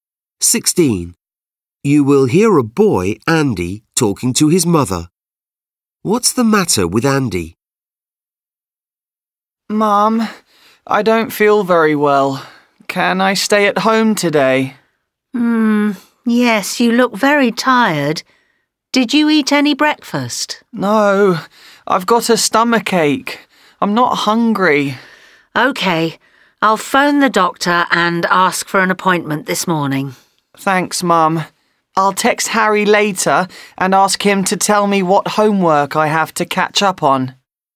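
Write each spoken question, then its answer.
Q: What's the matter with Andy?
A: He has a stomachache.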